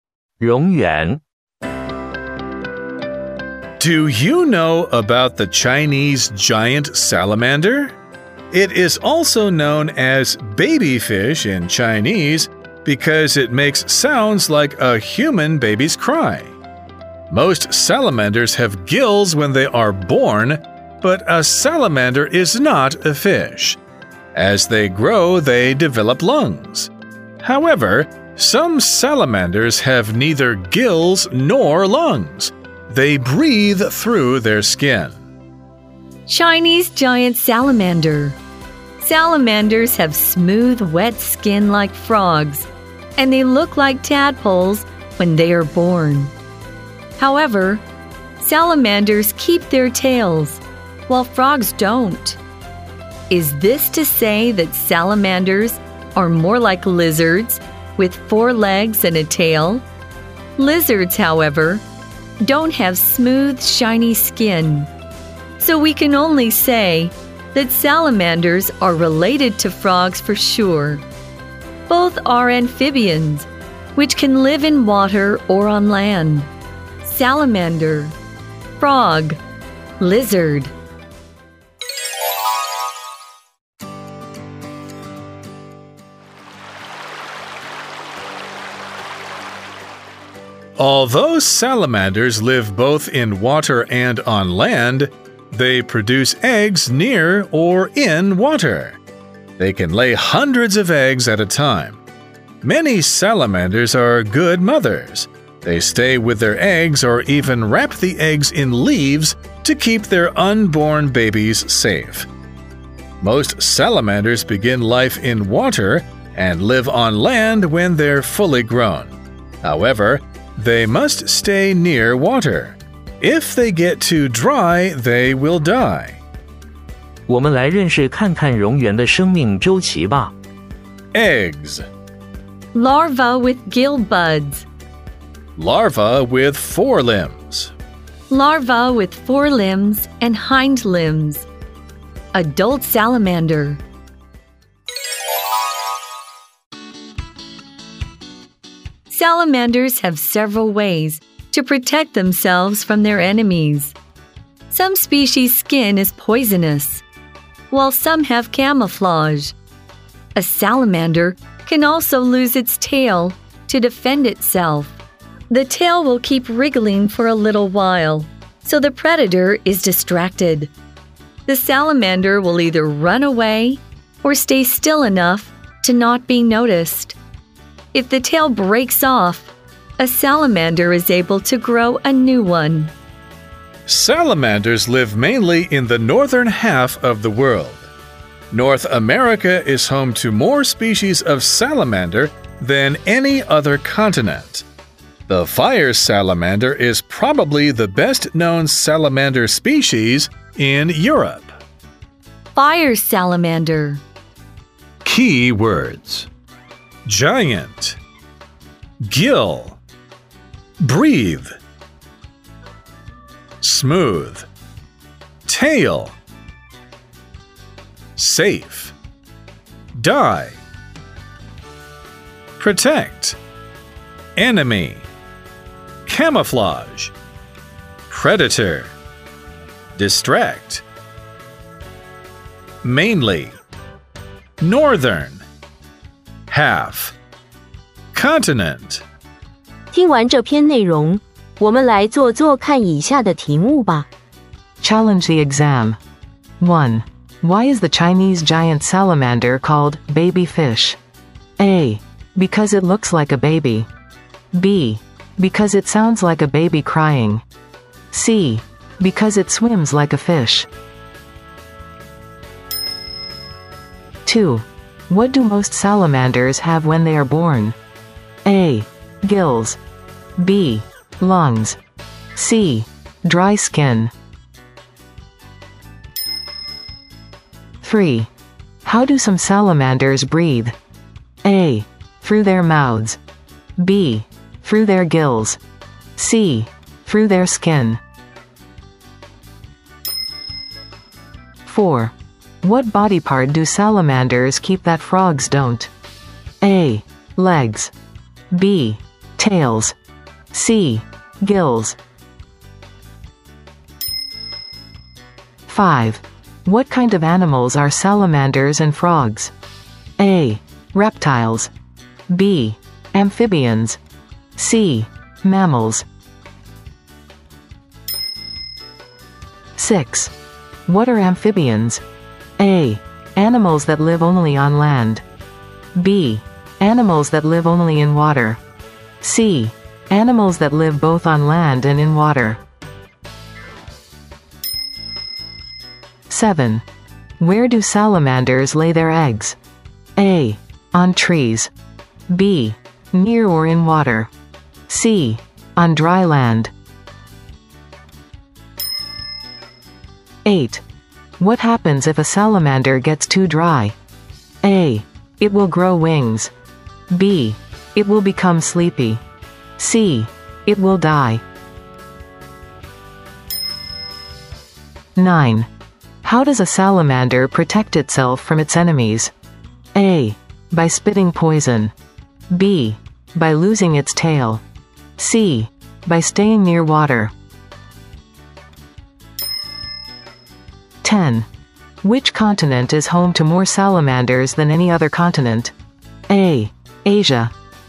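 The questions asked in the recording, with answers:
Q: Why is the Chinese giant salamander called baby fish?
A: B: Because it sounds like a baby crying.

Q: What do most salamanders have when they are born?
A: A: Gills.

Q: How do some salamanders breathe?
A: C: Through their skin.

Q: What body part do salamanders keep that frogs don't?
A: B: Tails.

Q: What kind of animals are salamanders and frogs?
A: B: Amphibians.

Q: What are amphibians?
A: C: Animals that live both on land and in water.

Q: Where do salamanders lay their eggs?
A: B: Near or in water.

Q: What happens if a salamander gets too dry?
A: C: It will die.

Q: How does a salamander protect itself from its enemies?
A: B: By losing its tail.

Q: Which continent is home to more salamanders than any other continent?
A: C: North America.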